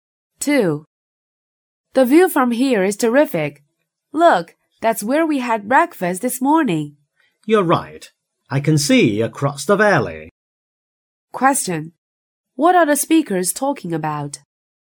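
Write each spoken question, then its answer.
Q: What are the speakers talking about?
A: The view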